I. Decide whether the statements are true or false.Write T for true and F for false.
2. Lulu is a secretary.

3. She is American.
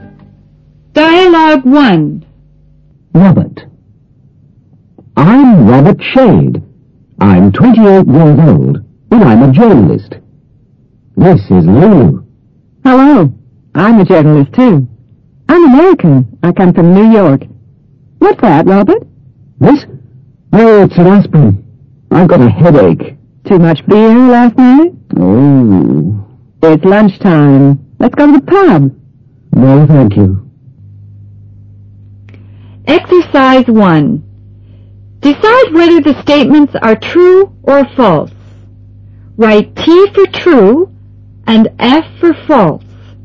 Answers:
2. F
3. T

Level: 英语听力入门